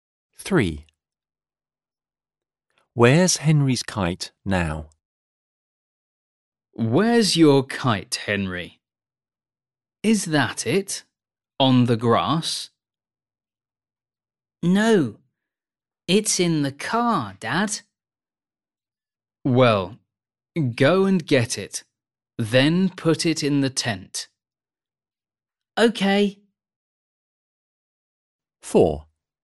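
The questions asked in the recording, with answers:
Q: Where's Henry's kite now?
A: in the car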